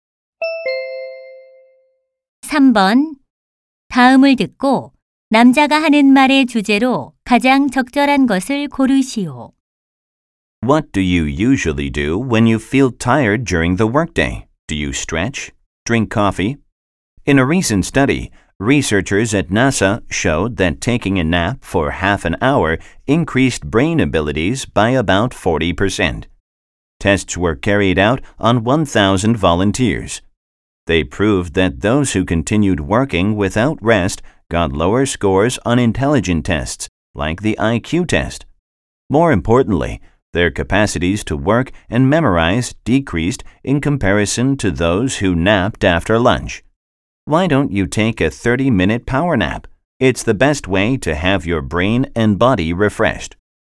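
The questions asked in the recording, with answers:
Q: 다음을 듣고 남자가 하는 말의 주제로 가장 적절한 것을 고르시오.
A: 업무 중 짧은 낮잠의 효과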